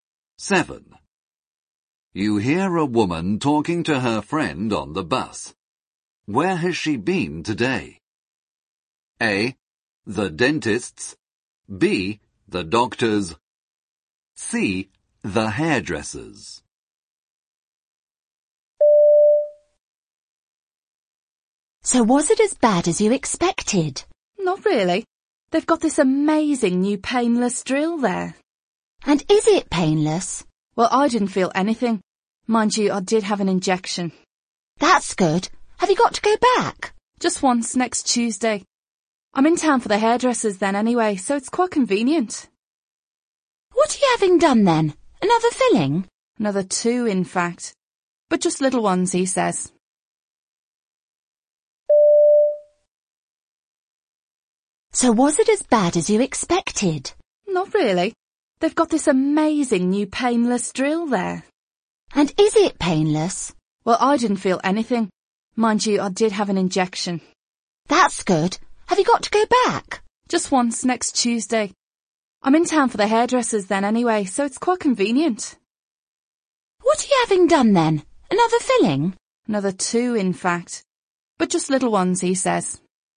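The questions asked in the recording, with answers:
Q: Where has she been today?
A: A: The dentist's.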